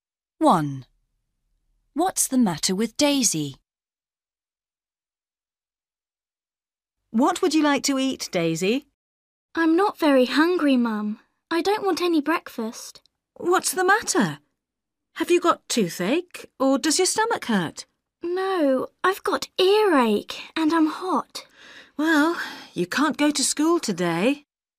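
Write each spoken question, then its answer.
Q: What's the matter with Daisy?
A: She has earache and is hot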